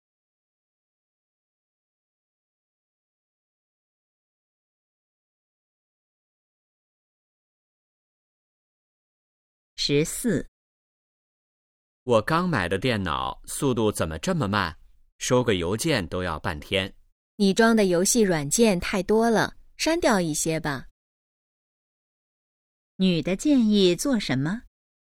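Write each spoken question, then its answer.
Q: 女的建议做什么?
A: 删掉一些游戏软件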